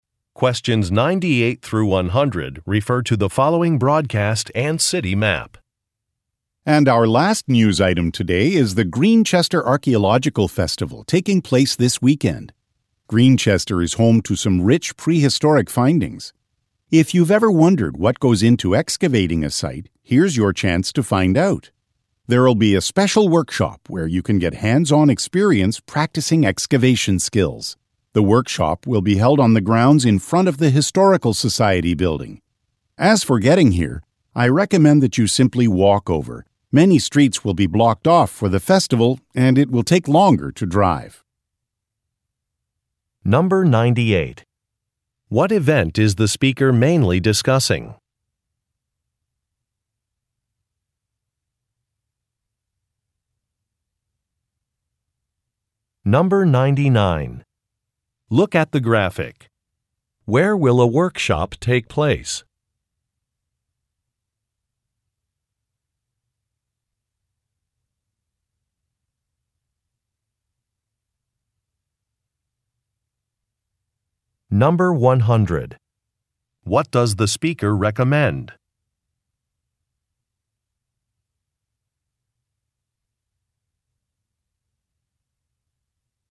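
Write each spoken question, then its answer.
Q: What event is the speaker mainly discussing?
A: An archaeological festival

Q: What does the speaker recommend?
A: Walking to the festival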